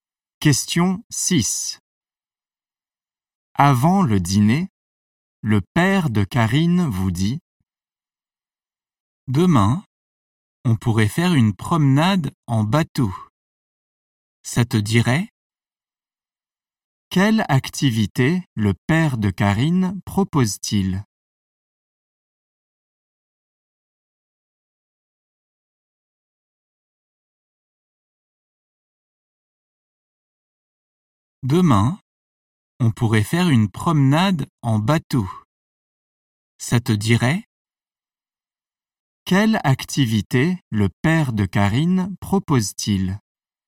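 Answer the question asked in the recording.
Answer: Une promenade en bateau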